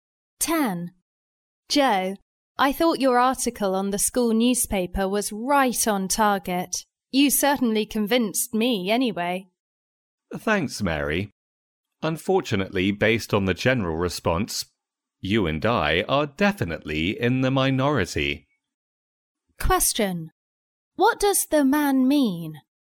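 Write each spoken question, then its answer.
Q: What does the man mean?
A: Most people disagreed with his article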